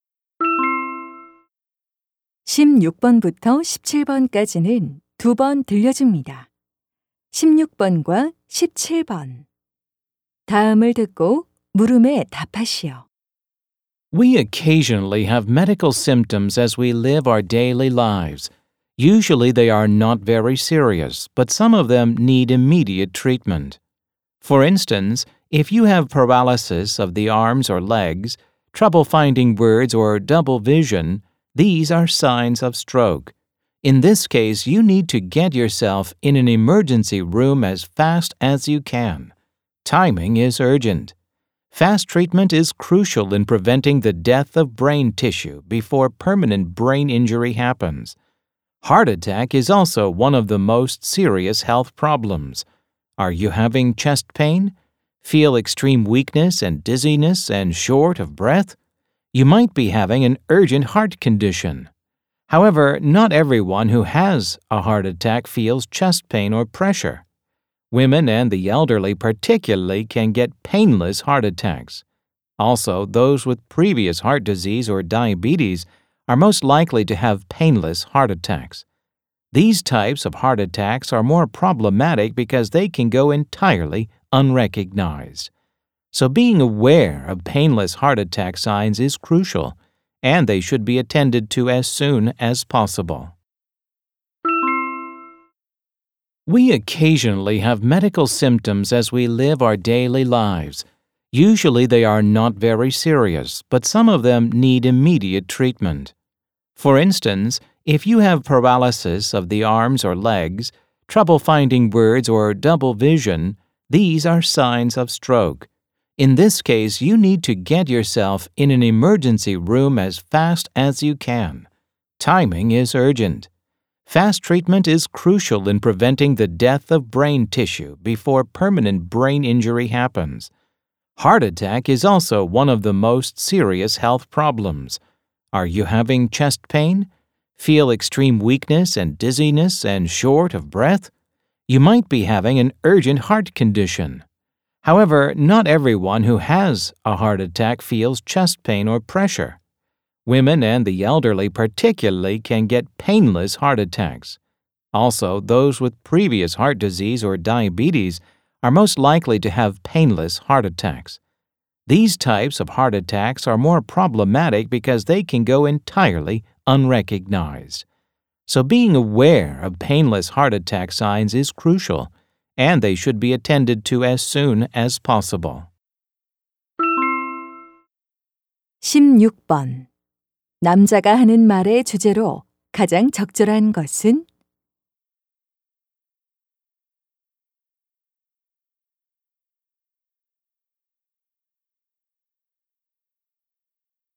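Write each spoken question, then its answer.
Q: 남자가 하는 말의 주제로 가장 적절한 것은?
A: 즉시 치료가 필요한 위급한 증상(뇌졸중·심장마비 징후)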